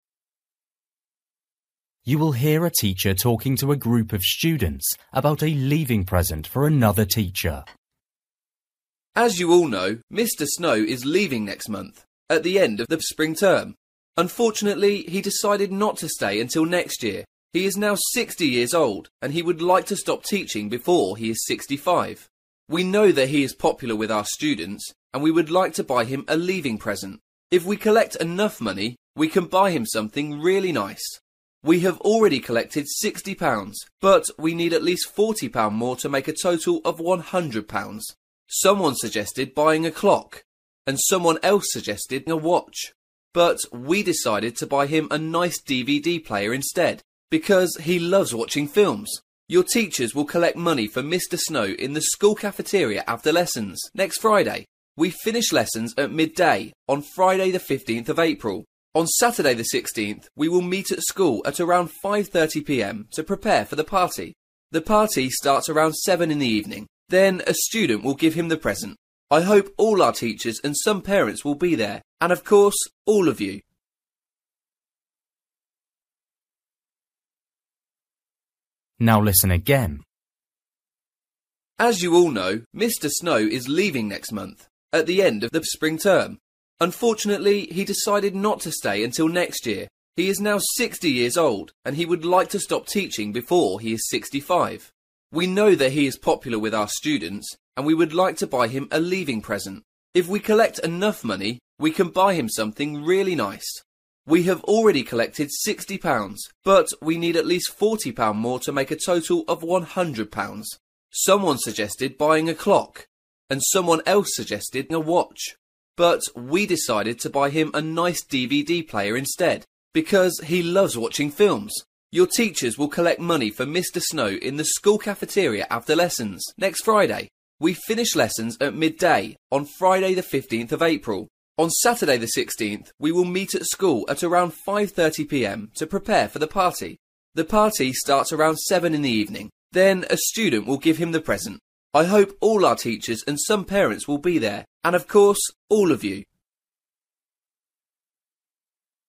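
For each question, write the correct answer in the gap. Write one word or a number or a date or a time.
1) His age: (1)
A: 60

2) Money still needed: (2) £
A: 40

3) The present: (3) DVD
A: player

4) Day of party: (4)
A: Saturday

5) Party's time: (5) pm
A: 7

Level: Luyện nghe trình độ A2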